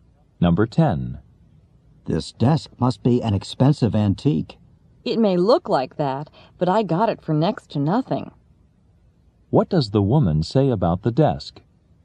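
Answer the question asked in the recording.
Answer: She bought it very cheaply.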